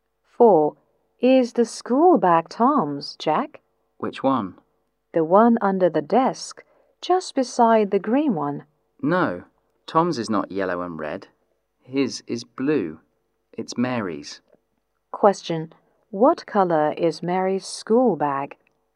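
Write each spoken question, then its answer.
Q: What colour is Mary's school bag?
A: Yellow and red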